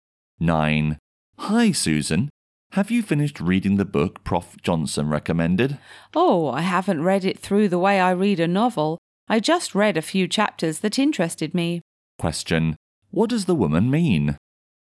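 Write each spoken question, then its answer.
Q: What does the woman mean?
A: She has only read a few chapters that interested her.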